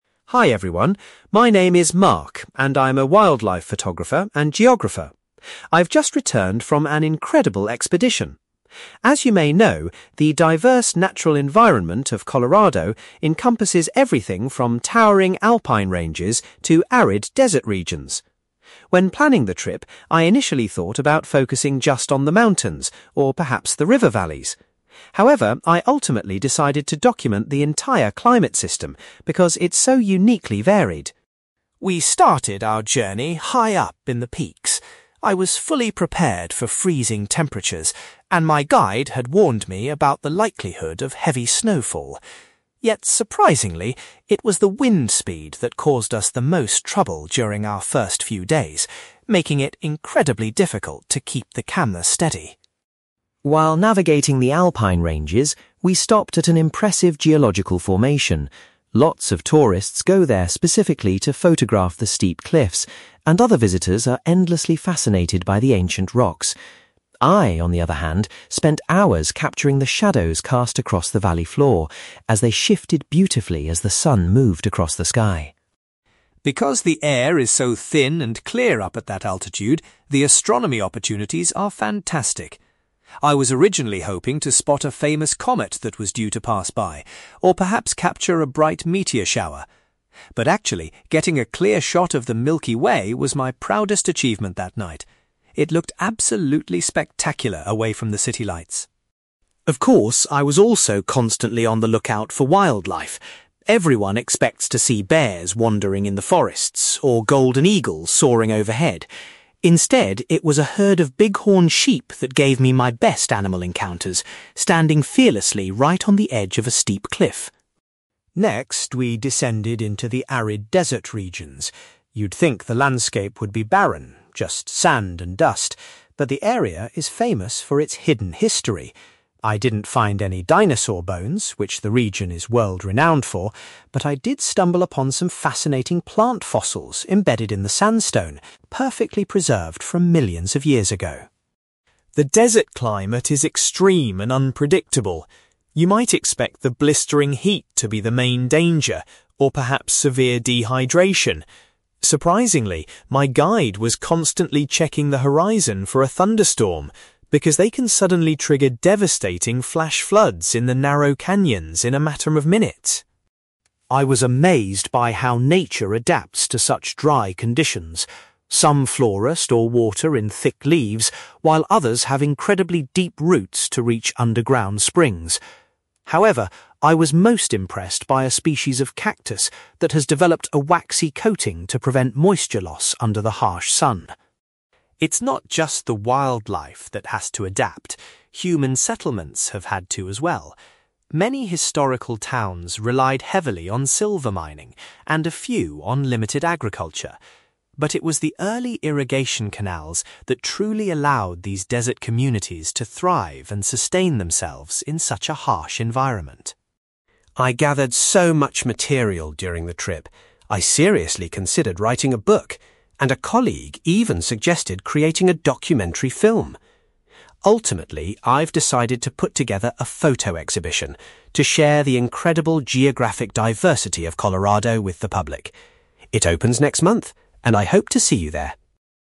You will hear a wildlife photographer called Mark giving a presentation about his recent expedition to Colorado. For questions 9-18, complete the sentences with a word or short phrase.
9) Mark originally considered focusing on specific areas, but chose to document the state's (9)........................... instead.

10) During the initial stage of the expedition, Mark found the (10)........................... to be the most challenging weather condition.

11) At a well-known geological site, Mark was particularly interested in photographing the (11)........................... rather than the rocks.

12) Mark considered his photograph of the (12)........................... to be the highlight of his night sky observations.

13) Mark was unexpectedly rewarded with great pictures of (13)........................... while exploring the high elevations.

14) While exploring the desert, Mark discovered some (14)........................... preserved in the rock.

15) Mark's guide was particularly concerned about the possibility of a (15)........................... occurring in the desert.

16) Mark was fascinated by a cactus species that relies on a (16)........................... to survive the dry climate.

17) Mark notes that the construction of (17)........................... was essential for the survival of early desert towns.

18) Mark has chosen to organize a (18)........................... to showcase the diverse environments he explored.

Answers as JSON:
{"9": "climate system", "10": "wind speed", "11": "shadows", "12": "Milky Way", "13": "bighorn sheep", "14": "plant fossils", "15": "thunderstorm", "16": "waxy coating", "17": "irrigation canals", "18": "photo exhibition"}

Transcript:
Mark: Hi everyone. My name is Mark, and I'm a wildlife photographer and geographer. I've just returned from an incredible expedition. As you may know, the diverse natural environment of Colorado encompasses everything from towering alpine ranges to arid desert regions. When planning the trip, I initially thought about focusing just on the mountains, or perhaps the river valleys. However, I ultimately decided to document the entire climate system because it's so uniquely varied.
We started our journey high up in the peaks. I was fully prepared for freezing temperatures, and my guide had warned me about the likelihood of heavy snowfall. Yet, surprisingly, it was the wind speed that caused us the most trouble during our first few days, making it incredibly difficult to keep the camera steady.
While navigating the alpine ranges, we stopped at an impressive geological formation. Lots of tourists go there specifically to photograph the steep cliffs, and other visitors are endlessly fascinated by the ancient rocks. I, on the other hand, spent hours capturing the shadows cast across the valley floor, as they shifted beautifully as the sun moved across the sky.
Because the air is so thin and clear up at that altitude, the astronomy opportunities are fantastic. I was originally hoping to spot a famous comet that was due to pass by, or perhaps capture a bright meteor shower. But actually, getting a clear shot of the Milky Way was my proudest achievement that night. It looked absolutely spectacular away from the city lights.
Of course, I was also constantly on the lookout for wildlife. Everyone expects to see bears wandering in the forests, or golden eagles soaring overhead. Instead, it was a herd of bighorn sheep that gave me my best animal encounters, standing fearlessly right on the edge of a steep cliff.
Next, we descended into the arid desert regions. You'd think the landscape would be barren, just sand and dust. But the area is famous for its hidden history. I didn't find any dinosaur bones, which the region is world-renowned for, but I did stumble upon some fascinating plant fossils embedded in the sandstone, perfectly preserved from millions of years ago.
The desert climate is extreme and unpredictable. You might expect the blistering heat to be the main danger, or perhaps severe dehydration. Surprisingly, my guide was constantly checking the horizon for a thunderstorm, because they can suddenly trigger devastating flash floods in the narrow canyons in a matter of minutes.
I was amazed by how nature adapts to such dry conditions. Some flora store water in thick leaves, while others have incredibly deep roots to reach underground springs. However, I was most impressed by a species of cactus that has developed a waxy coating to prevent moisture loss under the harsh sun.
It's not just the wildlife that has to adapt; human settlements have had to as well. Many historical towns relied heavily on silver mining, and a few on limited agriculture. But it was the early irrigation canals that truly allowed these desert communities to thrive and sustain themselves in such a harsh environment.
I gathered so much material during the trip. I seriously considered writing a book, and a colleague even suggested creating a documentary film. Ultimately, I've decided to put together a photo exhibition to share the incredible geographic diversity of Colorado with the public. It opens next month, and I hope to see you there!

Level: B2